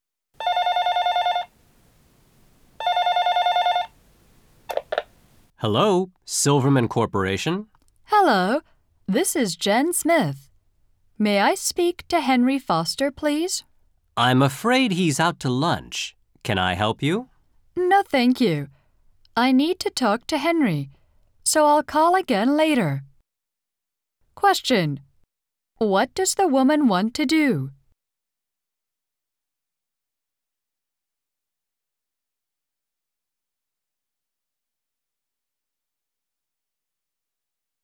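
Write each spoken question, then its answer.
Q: What does the woman want to do?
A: Talk to Henry Foster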